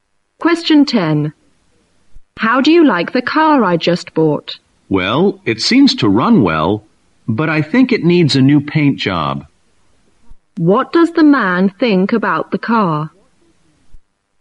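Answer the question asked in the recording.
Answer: It runs well but needs a new paint job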